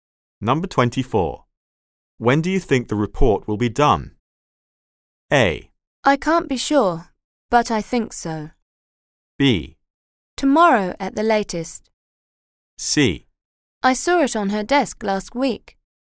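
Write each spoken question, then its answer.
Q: When do you think the report will be done?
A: B: Tomorrow at the latest.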